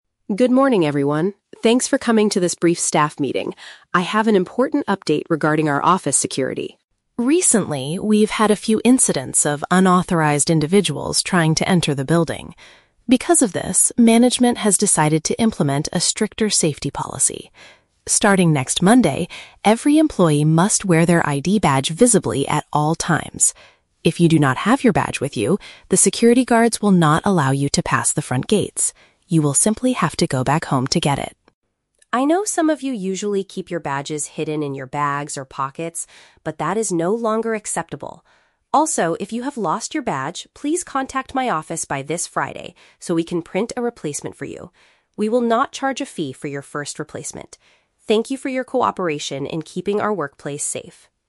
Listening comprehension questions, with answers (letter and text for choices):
Listen to an announcement from an HR Manager and choose the correct answer (A, B, or C) for each question.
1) What is the main purpose of this announcement?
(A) To introduce the company's new security guards.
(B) To inform the staff about a strict safety rule.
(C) To explain how to use the new electronic gates.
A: (B) To inform the staff about a strict safety rule.

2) What will happen if an employee forgets their identification card next week?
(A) They will have to pay a small financial penalty.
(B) They must wait for the manager to open the door.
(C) They will be denied entry to the workplace.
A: (C) They will be denied entry to the workplace.

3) What should employees do if they no longer have their badge?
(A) Ask the HR department for a new one before the weekend.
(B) Search for it carefully in their bags or jacket pockets.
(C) Borrow a temporary pass from the security team.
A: (A) Ask the HR department for a new one before the weekend.

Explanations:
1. The Key: The manager says, "management has decided to implement a stricter safety policy." A safety policy is a safety rule. The Trap (A): The manager mentions "security guards" who will check the badges, but she is not introducing new guards to the staff. Plausible but not mentioned (C): The "front gates" are mentioned, but there are no instructions on how to use them.
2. The Key: The manager warns that "the security guards will not allow you to pass the front gates." Not being allowed to pass means being denied entry. The Trap (A): The manager mentions a "fee" at the end, but she specifically says "We will not charge a fee", meaning there is no financial penalty. Plausible but not mentioned (B): Waiting for a manager's approval is a common procedure in some companies, but it is not mentioned here. The rule is that they "have to go back home to get it."
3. The Key: The manager says, "if you have lost your badge, please contact my office by this Friday so we can print a replacement." "By this Friday" means before the weekend, and a replacement is a new badge. The Trap (B): The manager mentions "bags or pockets," but she is complaining about people hiding their badges there, not telling people to search there if they lose them. Plausible but not mentioned (C): Borrowing a temporary pass is a logical solution when you forget a badge, but the manager does not offer this option.

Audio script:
Thanks for coming to this brief staff meeting. I have an important update regarding our office security.
Recently, we've had a few incidents of unauthorized individuals trying to enter the building. Because of this, management has decided to implement a stricter safety policy. Starting next Monday, every employee must wear their ID badge visibly at all times. If you do not have your badge with you, the security guards will not allow you to pass the front gates. You will simply have to go back home to get it.
I know some of you usually keep your badges hidden in your bags or pockets, but that is no longer acceptable. Also, if you have lost your badge, please contact my office by this Friday so we can print a replacement for you. We will not charge a fee for your first replacement. Thank you for your cooperation in keeping our workplace safe.